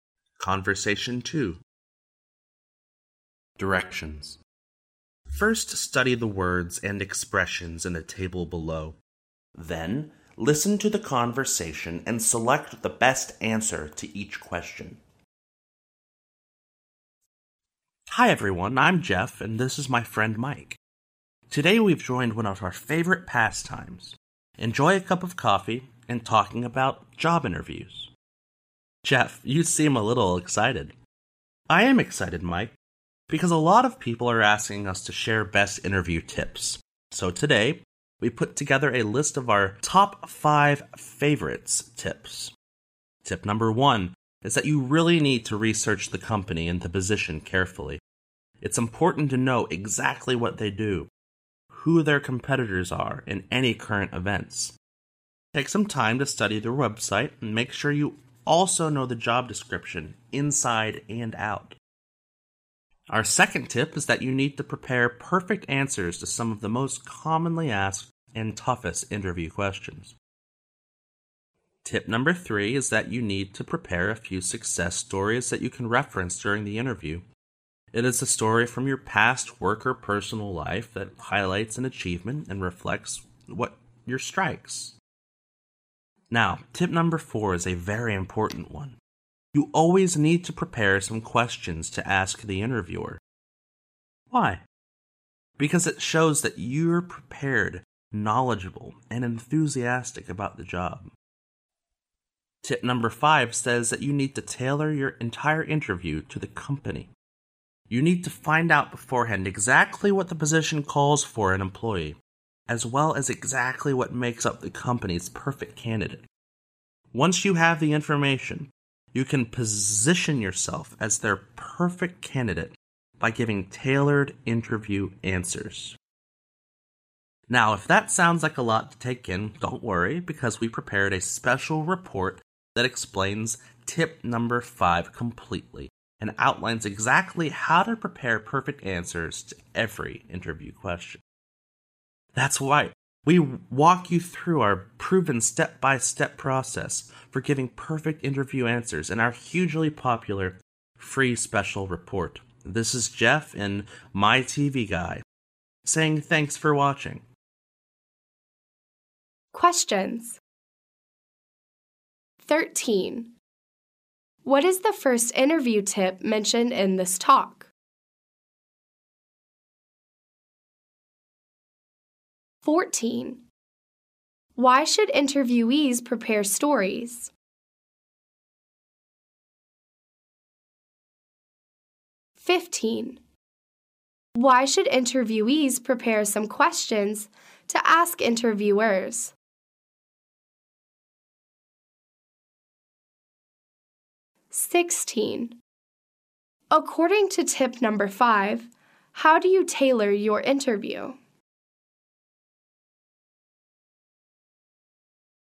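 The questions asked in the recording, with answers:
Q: What is the first interview tip mentioned in this talk?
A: Research the company and the position carefully.

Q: Why should interviewees prepare stories?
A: To highlight an achievement and reflect their strengths.

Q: Why should interviewees prepare some questions to ask interviewers?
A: It shows they are prepared, knowledgeable and enthusiastic about the job.

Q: According to tip number 5, how do you tailor your interview?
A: Find out what the position calls for and what the company's perfect candidate is, then give tailored answers.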